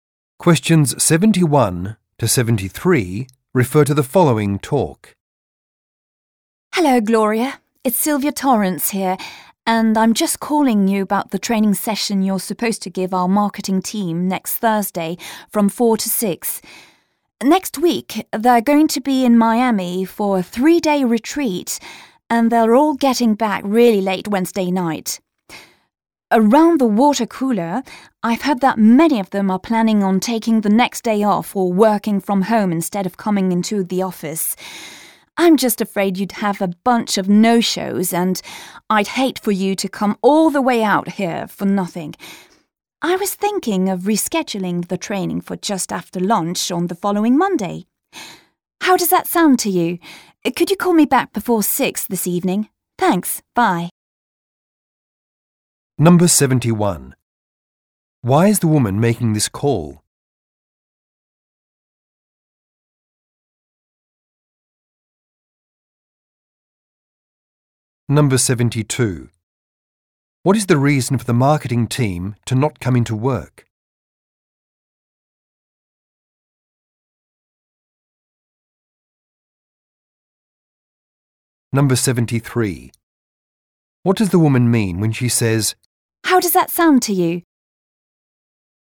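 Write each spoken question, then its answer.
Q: Why is the woman making this call?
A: To suggest rescheduling the training session

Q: What is the reason for the marketing team to not come into work?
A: They return late Wednesday night from a 3-day retreat in Miami

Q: What does the woman mean when she says,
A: She is asking whether Gloria agrees to the new time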